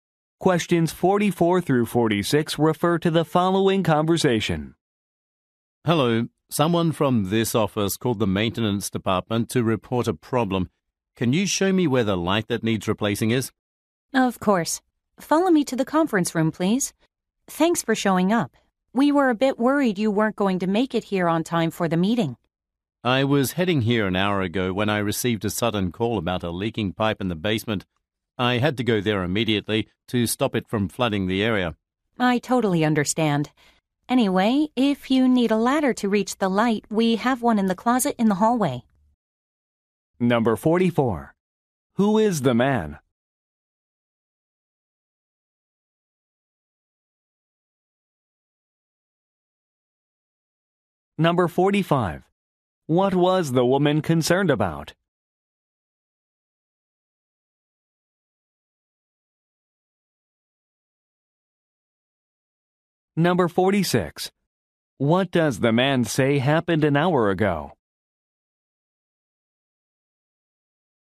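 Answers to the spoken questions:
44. A maintenance worker
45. That he wouldn't arrive in time for the meeting
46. He got a call about a leaking pipe in the basement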